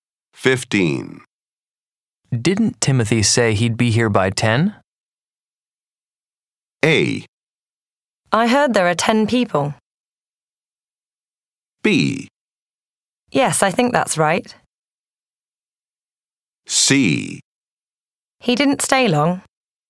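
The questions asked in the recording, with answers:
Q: Didn't Timothy say he'd be here by 10?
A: B: Yes, I think that's right.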